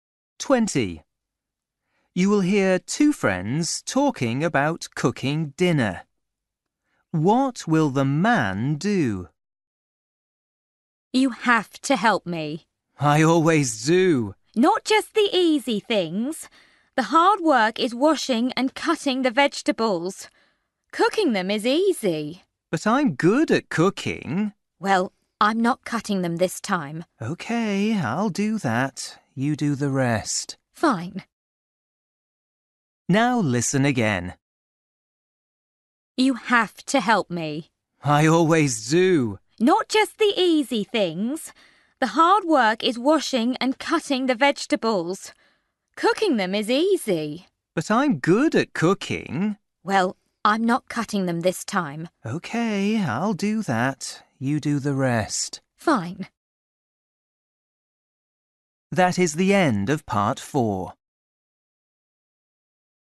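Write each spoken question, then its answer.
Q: What will the man do?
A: Wash and cut the vegetables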